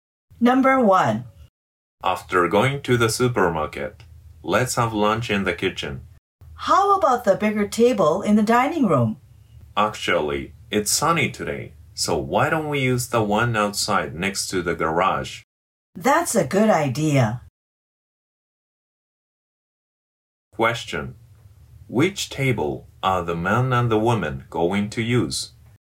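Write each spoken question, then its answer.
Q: Which table are the man and the woman going to use?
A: The one outside next to the garage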